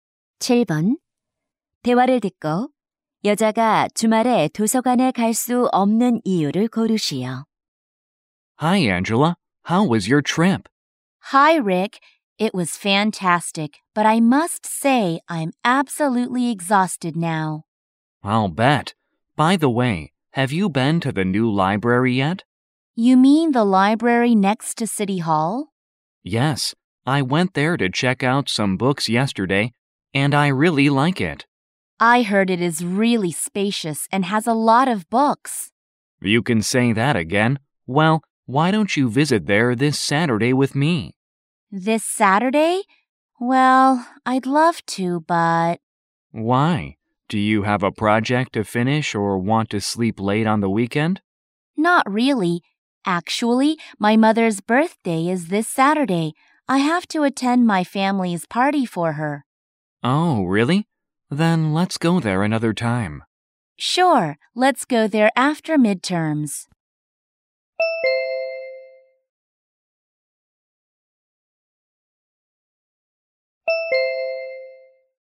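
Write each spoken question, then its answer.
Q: 대화를 듣고 여자가 주말에 도서관에 갈 수 없는 이유를 고르시오.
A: 어머니 생신 가족 파티에 참석해야 해서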